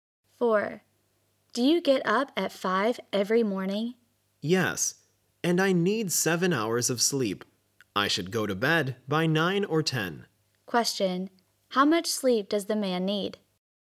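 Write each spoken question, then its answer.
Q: Question. How much sleep does the man need?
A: 7 hours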